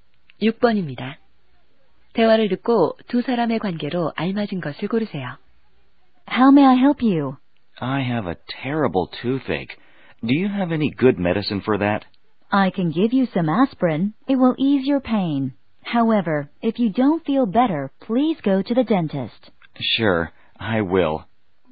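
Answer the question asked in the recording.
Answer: 약사와 손님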